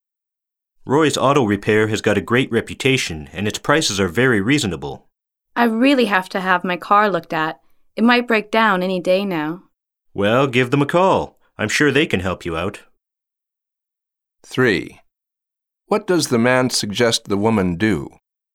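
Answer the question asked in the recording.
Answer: Call Roy's Auto Repair to have her car looked at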